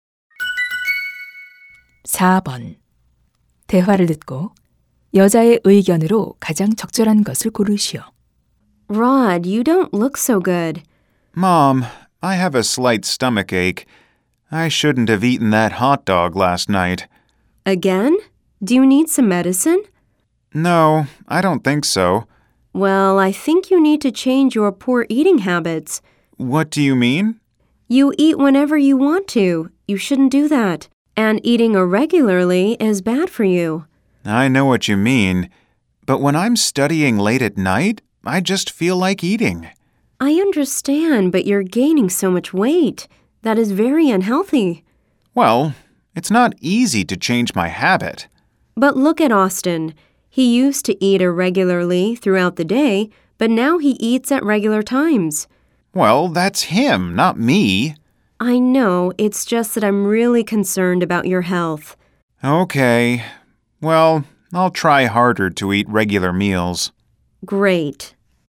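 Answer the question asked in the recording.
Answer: 규칙적으로 식사해야 한다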